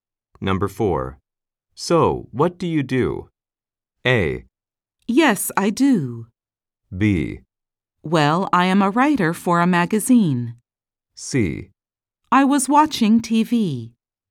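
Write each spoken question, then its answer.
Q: So, what do you do?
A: B: Well, I am a writer for a magazine.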